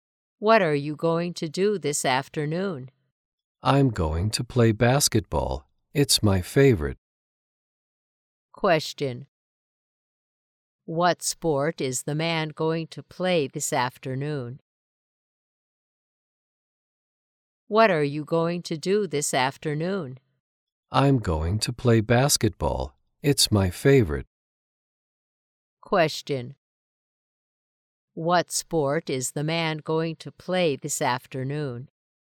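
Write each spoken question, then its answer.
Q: What sport is the man going to play this afternoon?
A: Basketball.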